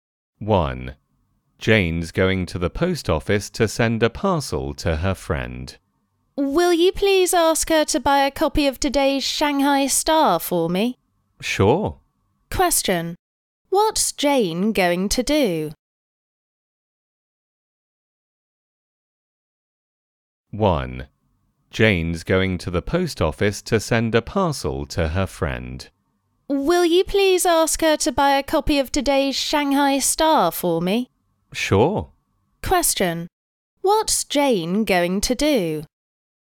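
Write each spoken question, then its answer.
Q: Question. What's Jane going to do?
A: Go to the post office to send a parcel to her friend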